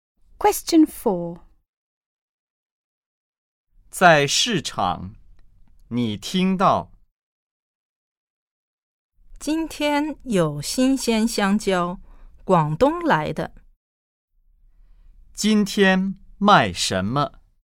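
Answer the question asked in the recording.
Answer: 香蕉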